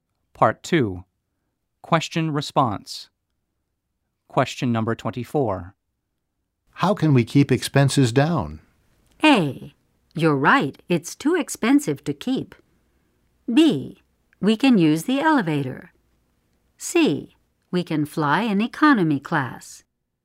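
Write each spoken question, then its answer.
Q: How can we keep expenses down?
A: C: We can fly in economy class.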